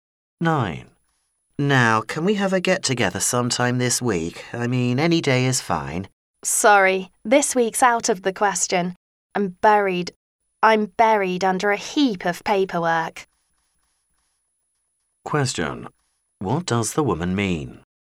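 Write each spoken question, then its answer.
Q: What does the woman mean?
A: She is too busy to get together this week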